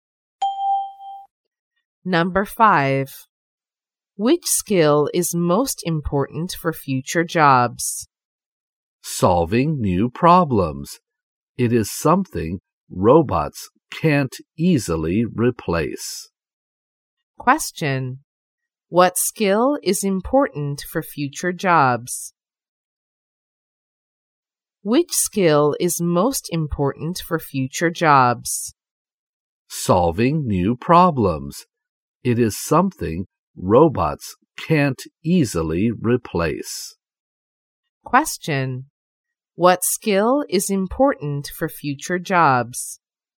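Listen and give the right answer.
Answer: Solving new problems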